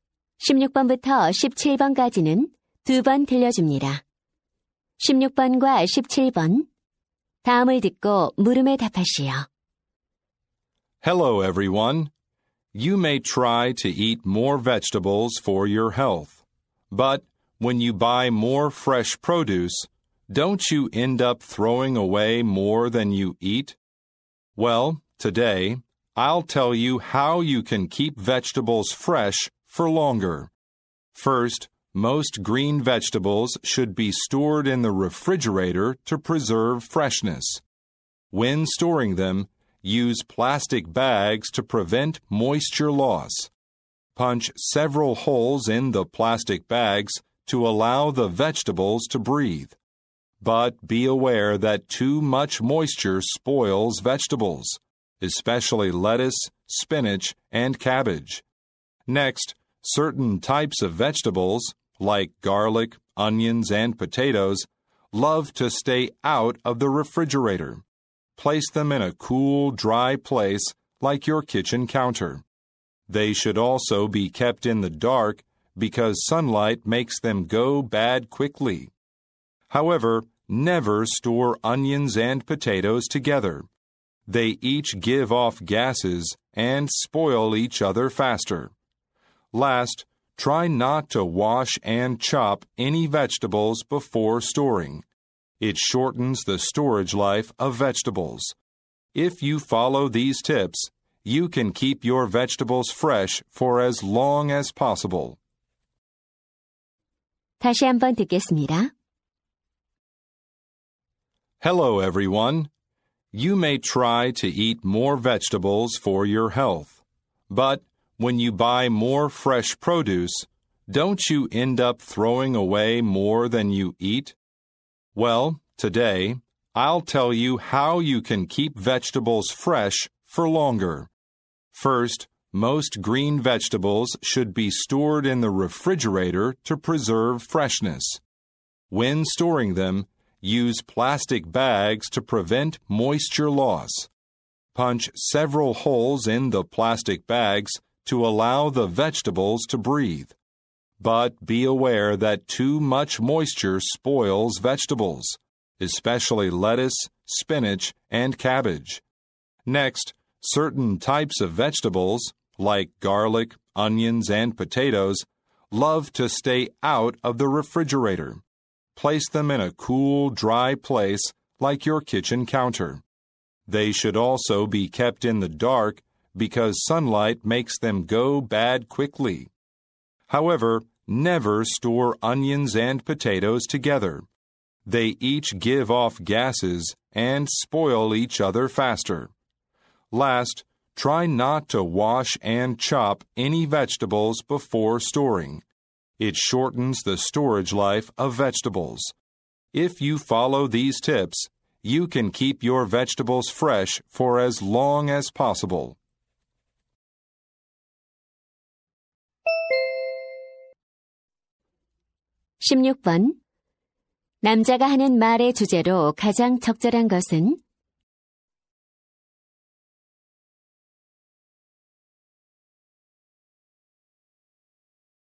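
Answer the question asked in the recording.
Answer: 채소를 오래 신선하게 보관하는 방법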